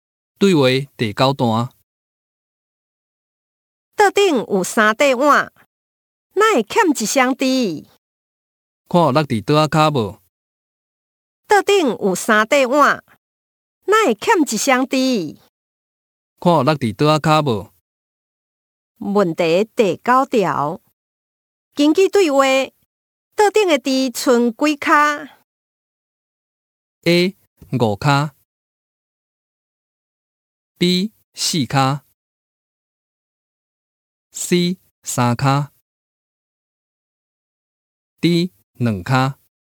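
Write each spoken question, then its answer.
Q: 根据对话,桌顶的滴剩几脚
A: B: 四卡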